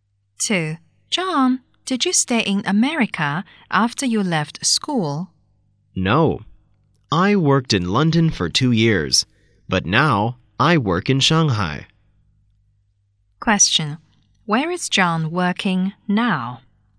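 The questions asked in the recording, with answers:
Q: Where is John working now?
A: In Shanghai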